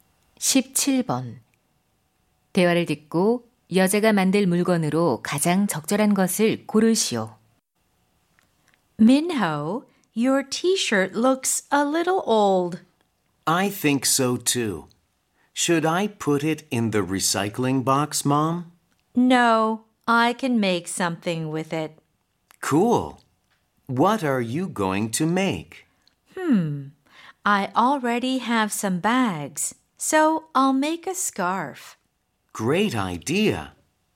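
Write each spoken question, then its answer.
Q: 대화를 듣고 여자가 만들 물건으로 가장 적절한 것을 고르시오.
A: 스카프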